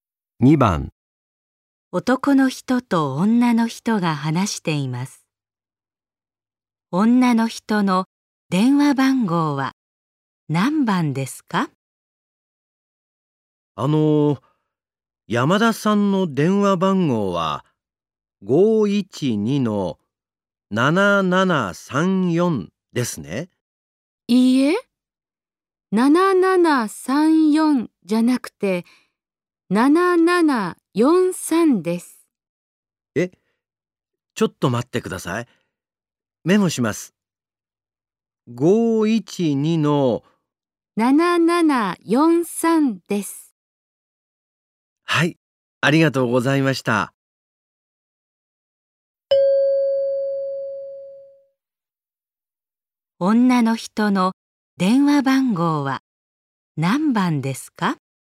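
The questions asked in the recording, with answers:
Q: 女の人の電話番号は何番ですか?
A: 512-7743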